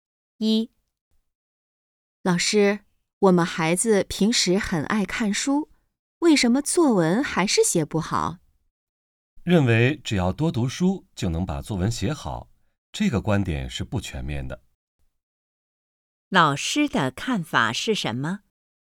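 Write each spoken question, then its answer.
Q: 老师的看法是什么?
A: 只多读书不一定能写好作文,这个观点不全面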